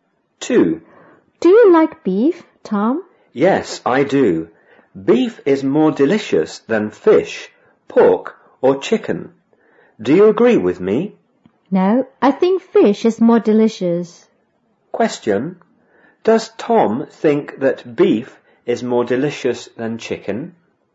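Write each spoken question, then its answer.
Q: Question, does Tom think that beef is more delicious than chicken?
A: Yes, he does.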